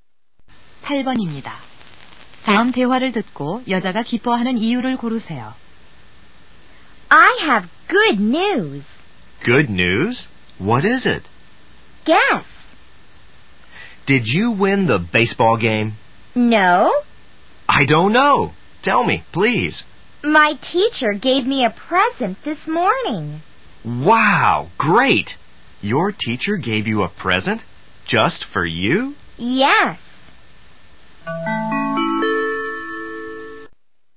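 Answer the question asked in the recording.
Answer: 선생님께 선물을 받아서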